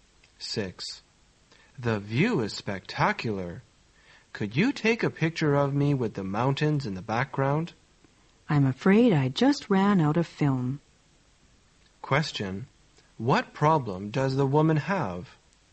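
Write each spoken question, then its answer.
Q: What problem does the woman have?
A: She has run out of film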